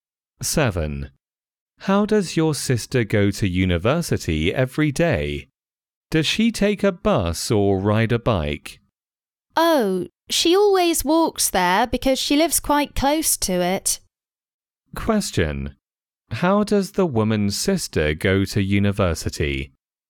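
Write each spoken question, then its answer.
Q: How does the woman's sister go to university?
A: She walks there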